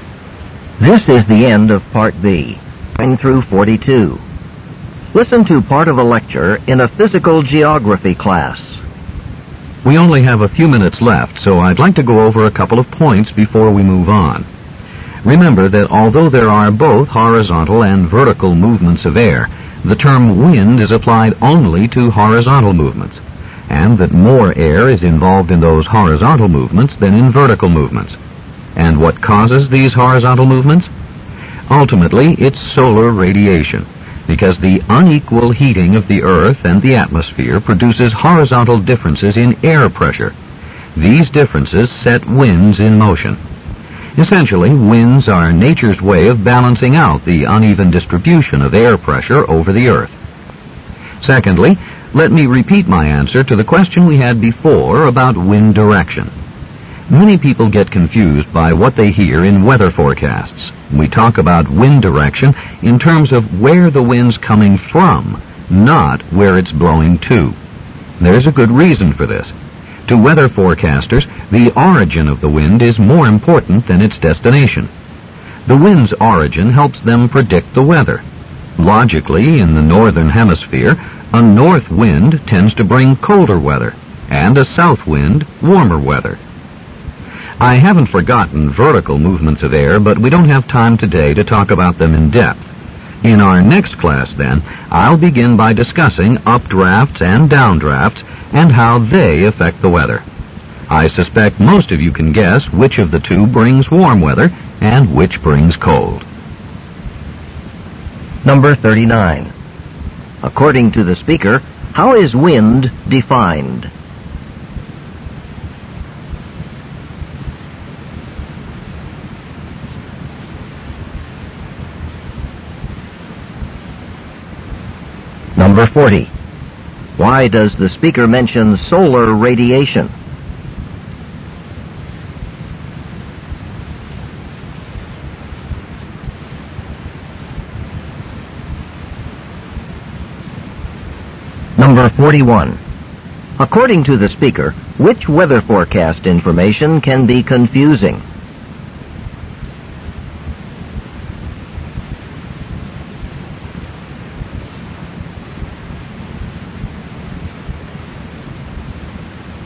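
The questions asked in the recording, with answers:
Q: According to the speaker, how is wind defined?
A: Horizontal movement of air

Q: Why does the speaker mention solar radiation?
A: It is the ultimate cause of winds.

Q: According to the speaker, which weather forecast information can be confusing?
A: Wind direction

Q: What will the speaker probably discuss in the next class?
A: Updrafts and downdrafts (vertical air movements)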